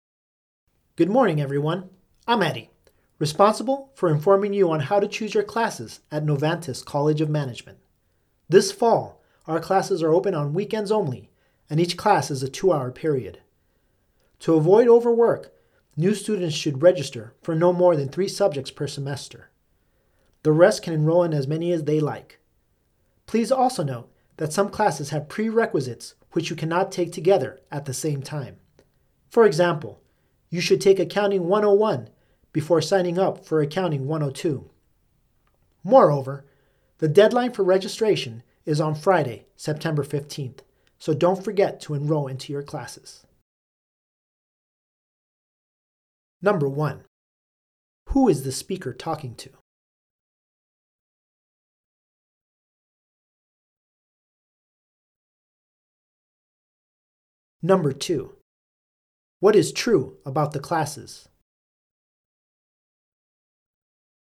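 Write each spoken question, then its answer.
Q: Who is the speaker talking to?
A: Students choosing classes at Novantas College of Management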